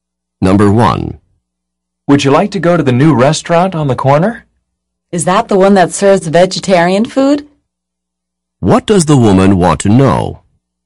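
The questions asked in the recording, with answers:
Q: What does the woman want to know?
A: Whether the new restaurant serves vegetarian food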